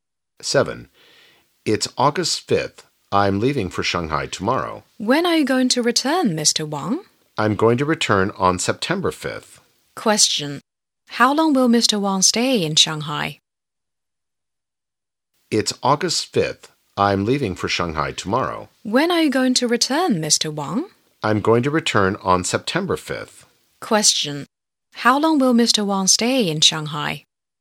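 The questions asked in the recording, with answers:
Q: How long will Mr. Wang stay in Shanghai?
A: About a month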